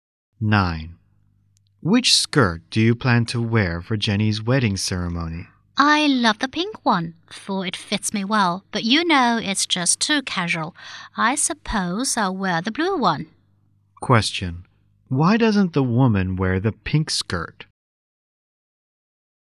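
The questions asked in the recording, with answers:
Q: Why doesn't the woman wear the pink skirt?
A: It is too casual.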